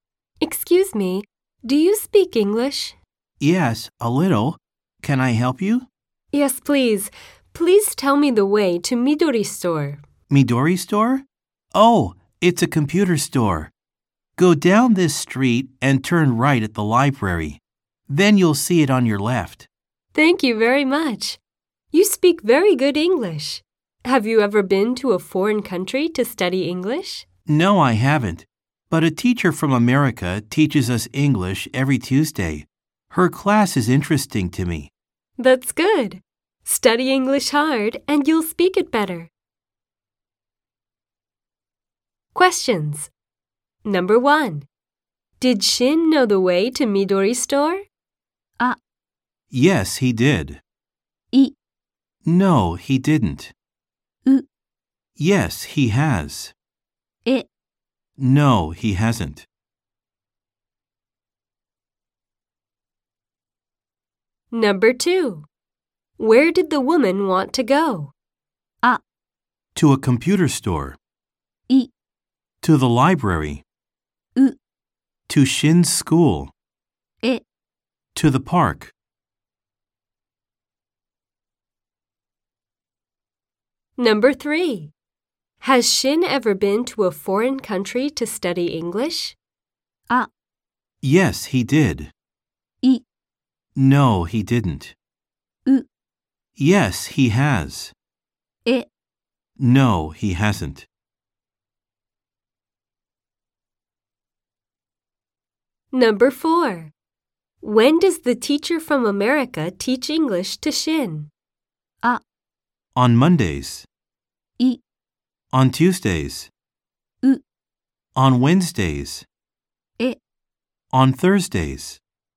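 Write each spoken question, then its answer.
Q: Did Shin know the way to Midori Store?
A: あ: Yes, he did.

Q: Where did the woman want to go?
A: あ: To a computer store.

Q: Has Shin ever been to a foreign country to study English?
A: え: No, he hasn't.

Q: When does the teacher from America teach English to Shin?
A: い: On Tuesdays.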